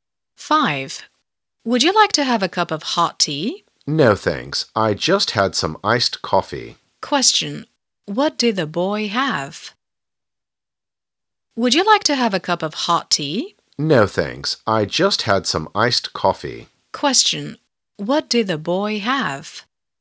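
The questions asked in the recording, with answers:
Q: what did the boy have?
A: Some iced coffee.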